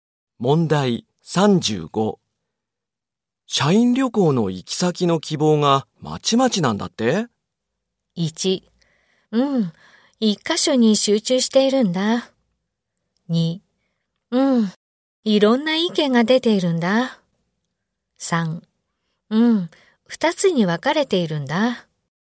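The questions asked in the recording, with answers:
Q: 社員旅行の行き先の希望がまちまちなんだって?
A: 2: うん、いろんな意見が出ているんだ。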